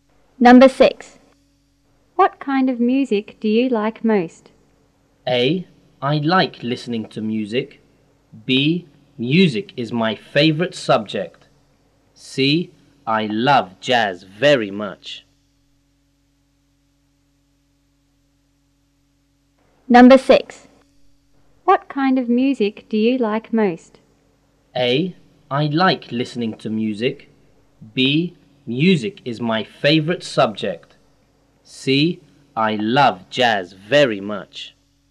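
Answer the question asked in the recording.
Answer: C: I love jazz very much.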